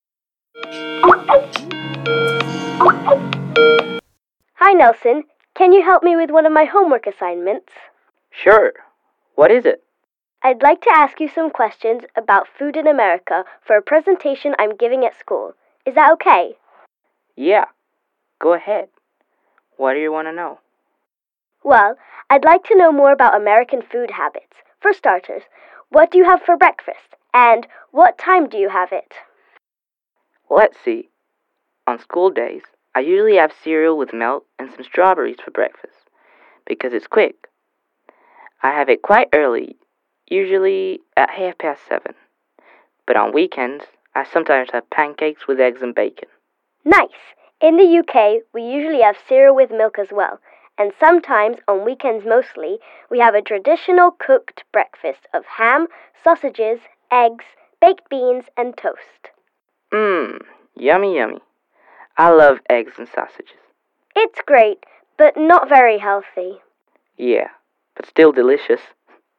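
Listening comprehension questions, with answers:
Listen to a conversation between two friends and decide whether the statement is true or false.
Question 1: On schooldays Nelson has breakfast quite early.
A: True

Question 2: Nelson thinks that traditional cooked breakfast in the UK on the weekends is not tasty.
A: False

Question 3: Nelson likes eggs and bacon.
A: True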